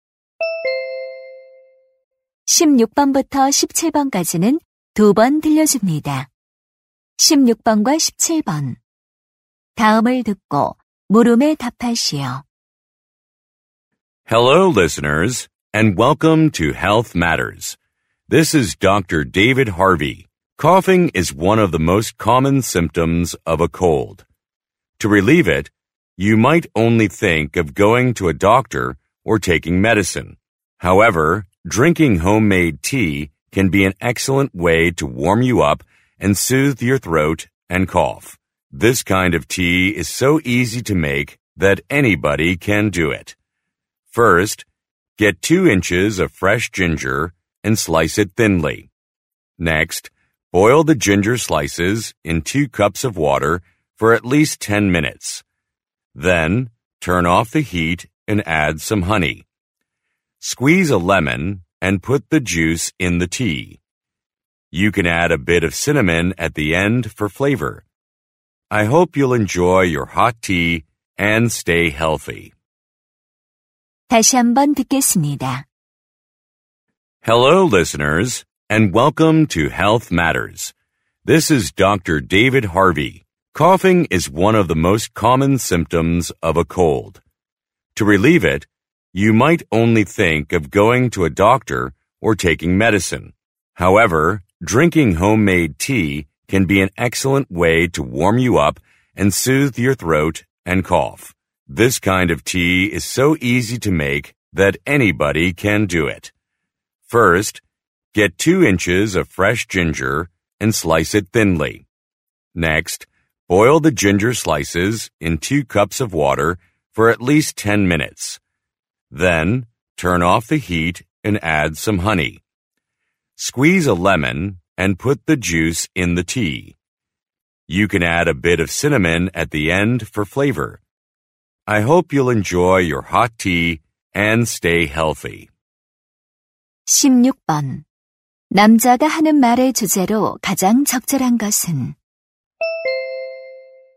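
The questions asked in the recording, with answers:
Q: 남자가 하는 말의 주제로 가장 적절한 것은?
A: 기침 완화를 위한 수제 차 만드는 법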